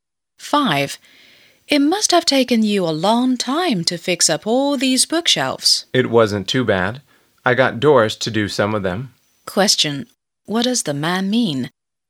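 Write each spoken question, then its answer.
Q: What does the man mean?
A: Doris helped him fix some of the bookshelves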